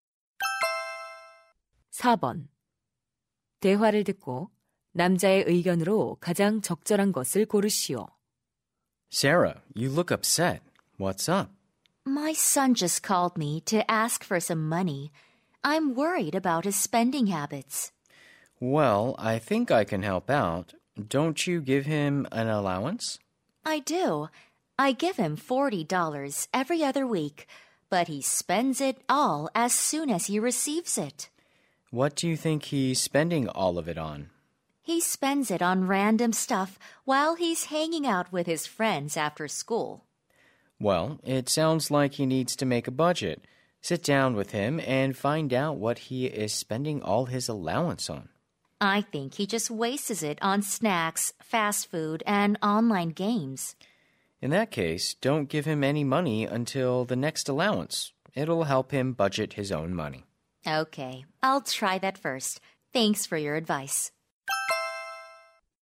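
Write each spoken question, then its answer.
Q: 대화를 듣고 남자의 의견으로 가장 적절한 것을 고르시오.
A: 용돈을 다 쓰면 다음 용돈 때까지 돈을 주지 말아야 한다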